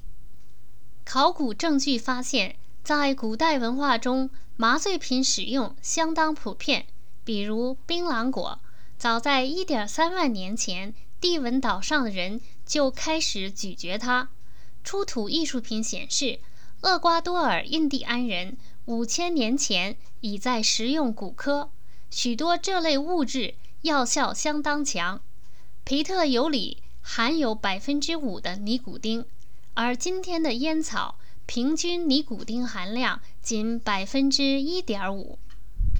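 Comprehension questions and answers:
烟草中尼古丁的平均含量是多少?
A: 1.5%

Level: 3rd Year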